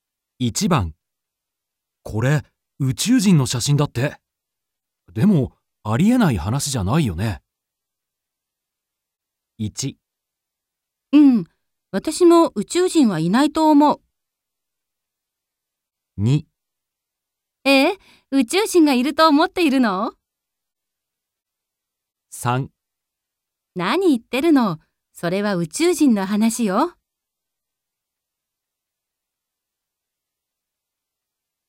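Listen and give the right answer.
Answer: 2: 宇宙人がいると思っているの?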